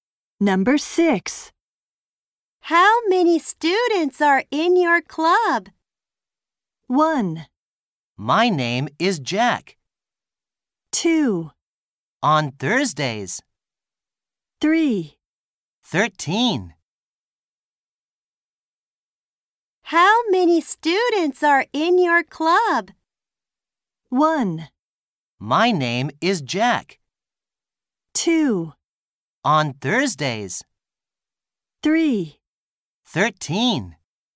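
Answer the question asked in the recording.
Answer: 3: 13.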